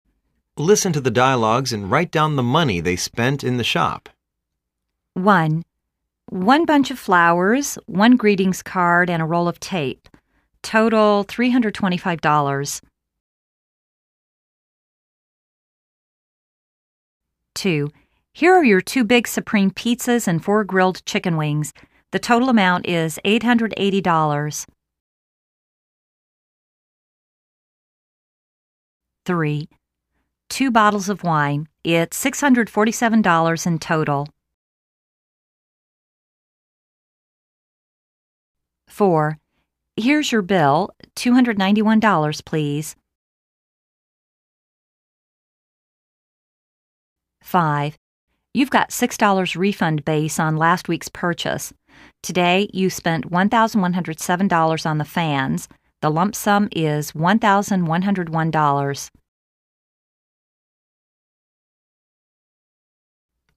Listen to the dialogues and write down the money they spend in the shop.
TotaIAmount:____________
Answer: $325

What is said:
1.One bunch of flowers, one greetings card and a roll of tape.Total $325.
2.Here are your two big Supreme pizzas and four grilled chicken wings. The total amount is $880.
3.Two bottles of wine. lt's $647 in total.
4.Here's your bill, $291, please.
5.You've got 6 dollars refund base on last week's purchase.